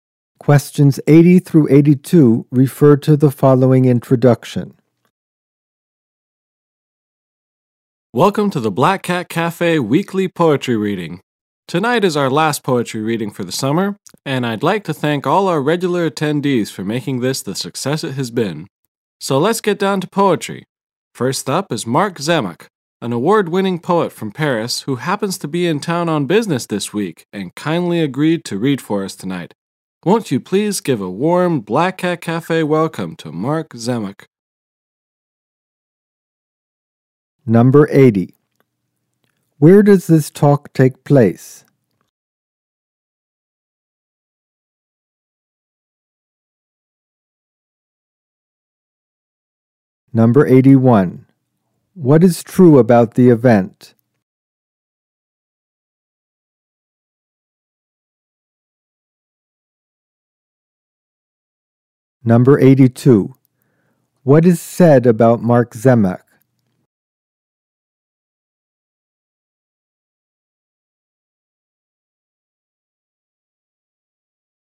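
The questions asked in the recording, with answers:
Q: Where does this talk take place?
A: At the Black Cat Cafe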